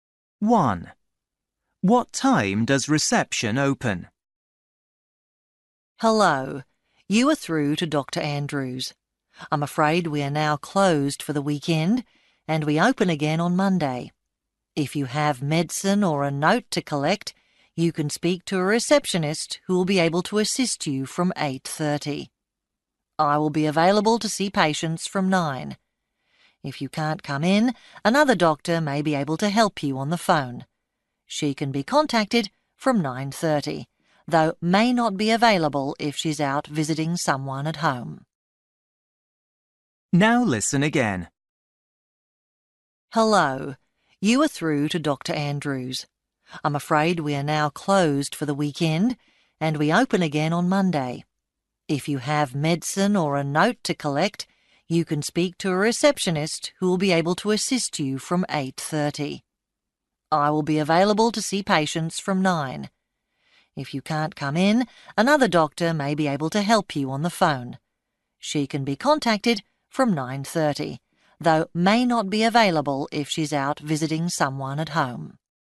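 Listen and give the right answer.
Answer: 8:30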